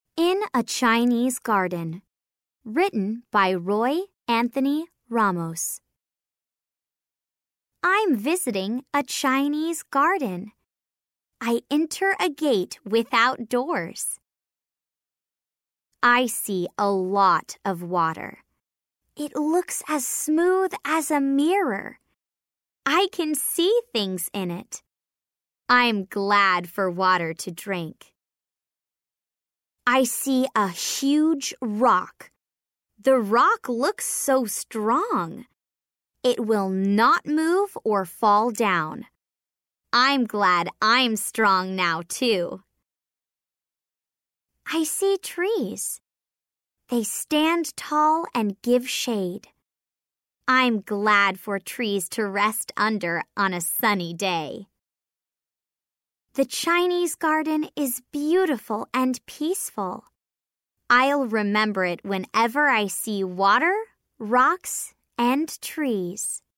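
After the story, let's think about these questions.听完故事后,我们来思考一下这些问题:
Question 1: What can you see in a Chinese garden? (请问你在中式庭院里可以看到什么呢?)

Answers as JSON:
{"1": "A gate without doors, water, a huge rock and trees."}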